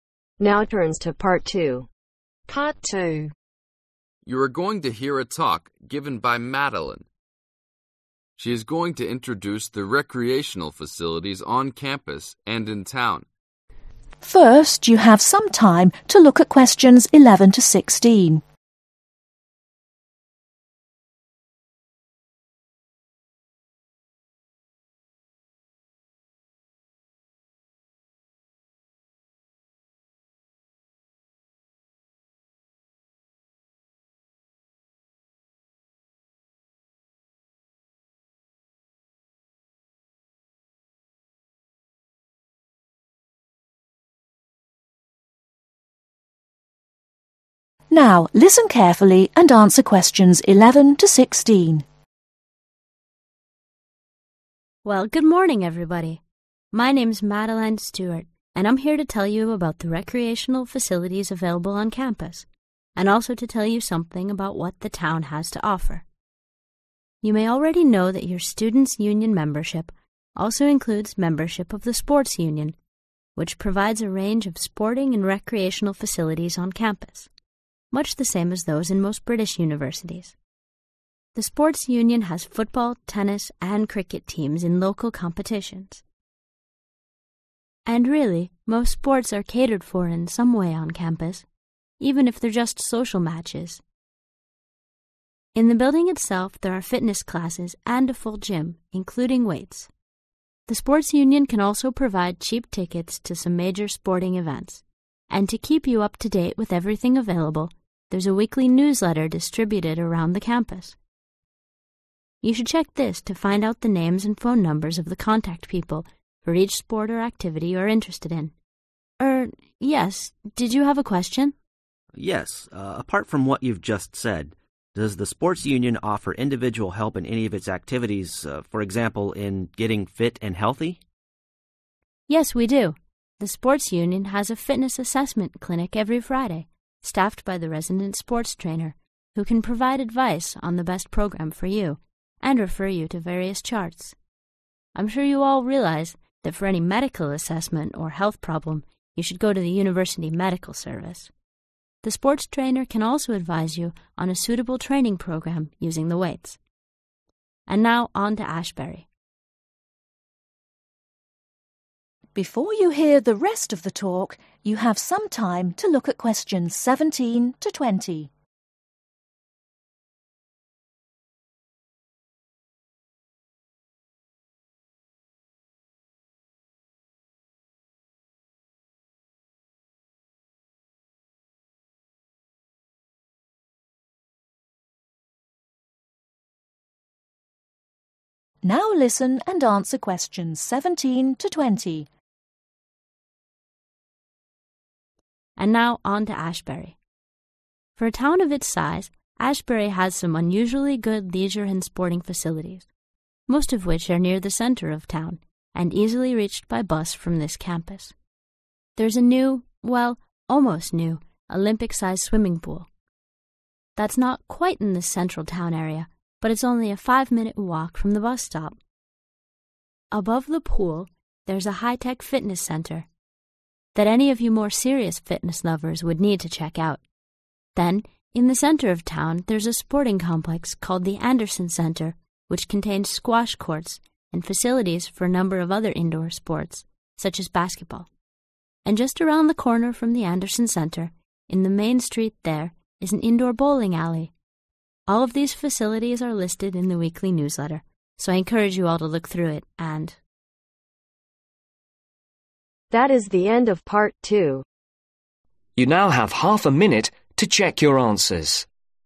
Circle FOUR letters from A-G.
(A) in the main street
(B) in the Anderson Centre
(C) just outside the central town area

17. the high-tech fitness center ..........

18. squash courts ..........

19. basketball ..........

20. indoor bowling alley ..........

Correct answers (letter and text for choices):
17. (C) just outside the central town area
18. (B) in the Anderson Centre
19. (B) in the Anderson Centre
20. (A) in the main street